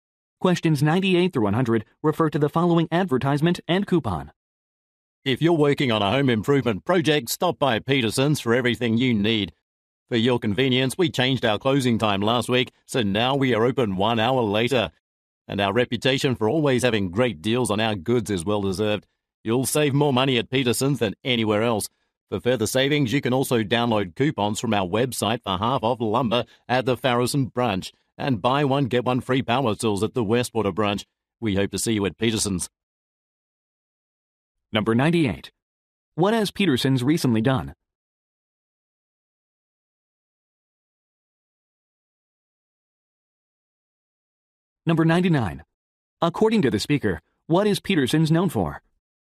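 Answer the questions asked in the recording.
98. Extended its business hours by one hour
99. Great deals / low prices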